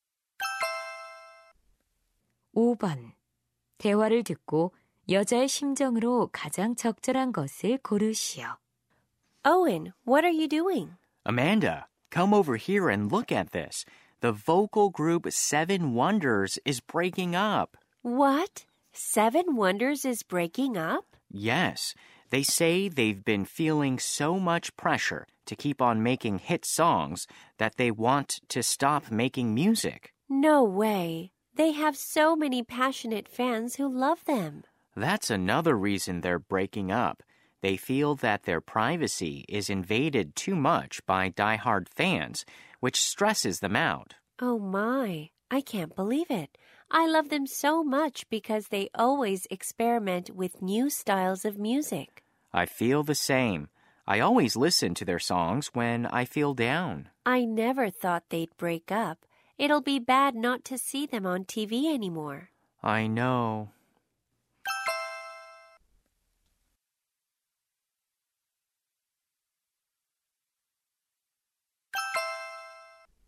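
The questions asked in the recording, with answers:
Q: 대화를 듣고 여자의 심정으로 가장 적절한 것을 고르시오.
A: 충격받고 실망함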